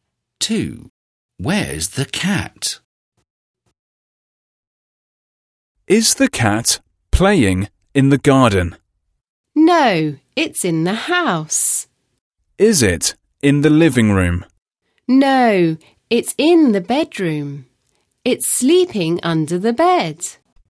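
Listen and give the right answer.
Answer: Under the bed in the bedroom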